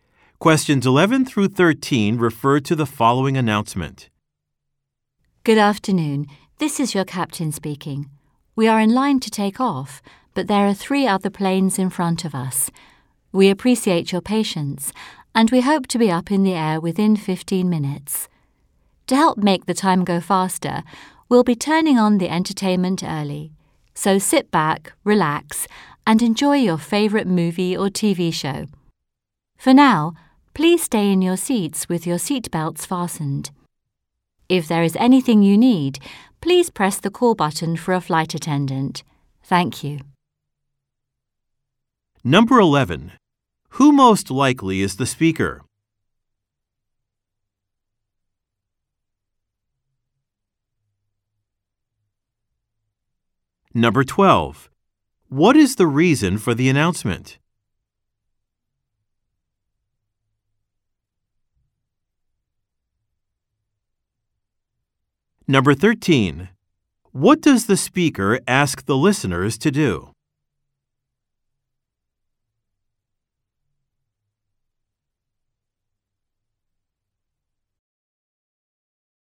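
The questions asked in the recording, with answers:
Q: Who most likely is the speaker?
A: The plane's captain (a pilot)

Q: What is the reason for the announcement?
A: To explain a delay in takeoff

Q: What does the speaker ask the listeners to do?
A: Stay in their seats with seatbelts fastened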